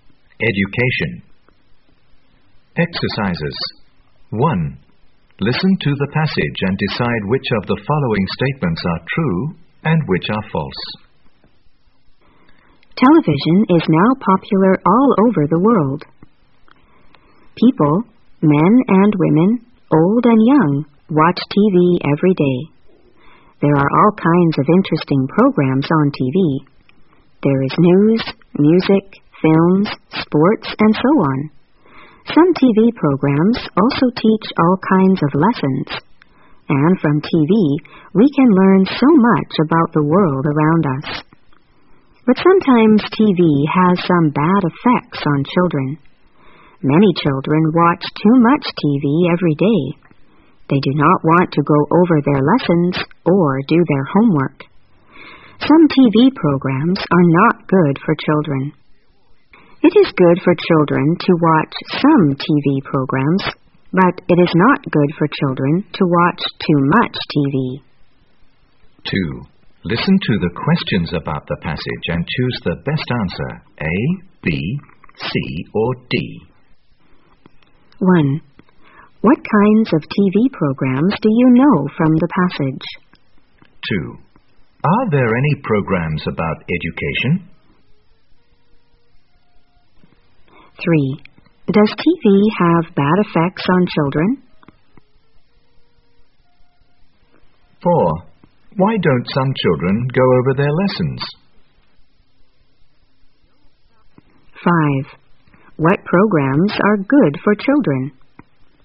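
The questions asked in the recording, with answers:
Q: What kinds of TV programs do you know from the passage?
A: News, music, films, sports, and lessons

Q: Are there any programs about education?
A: Yes, some programs teach all kinds of lessons

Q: Does TV have bad effects on children?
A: Yes, sometimes

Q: Why don't some children go over their lessons?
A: Because they watch too much TV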